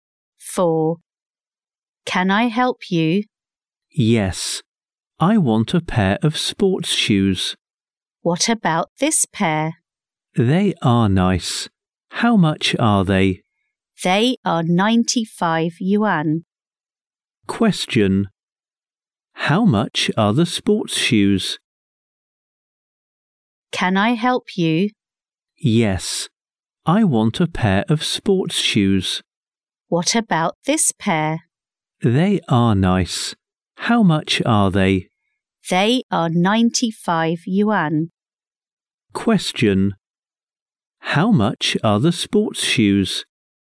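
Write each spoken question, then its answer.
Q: How much are the sports shoes?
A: 95 yuan.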